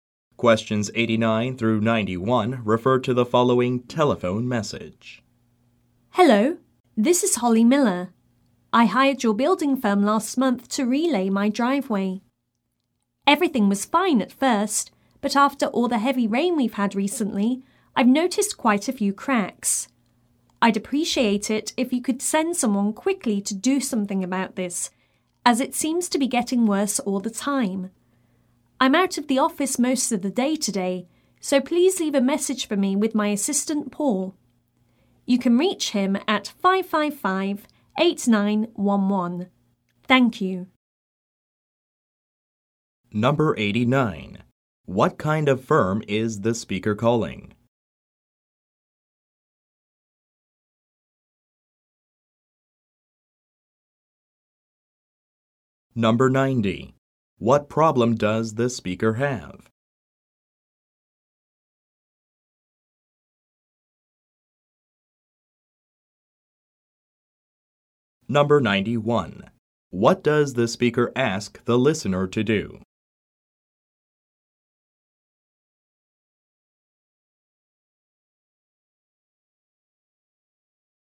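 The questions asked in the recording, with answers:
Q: What kind of firm is the speaker calling?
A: A building firm

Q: What problem does the speaker have?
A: Her driveway has cracks after heavy rain

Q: What does the speaker ask the listener to do?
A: Send someone quickly to fix the driveway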